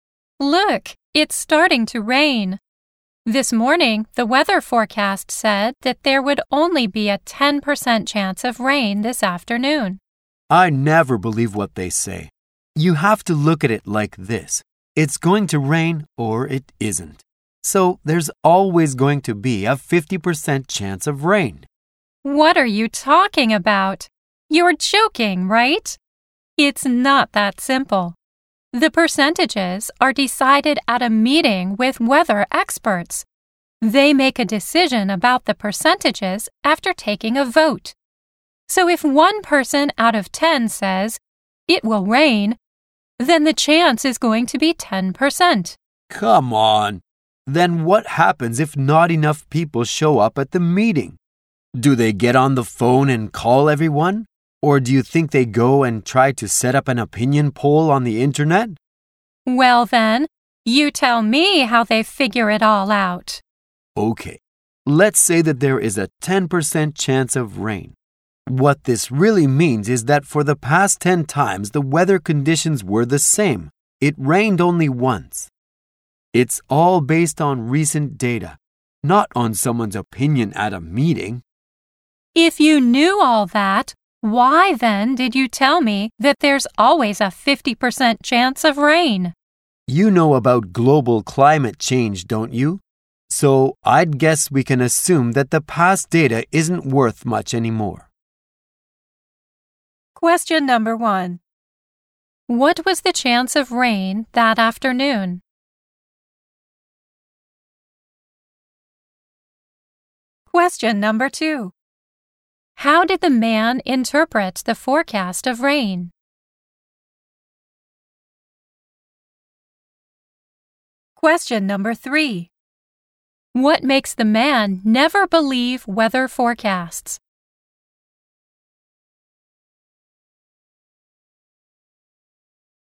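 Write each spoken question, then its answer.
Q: What was the chance of rain that afternoon?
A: 10%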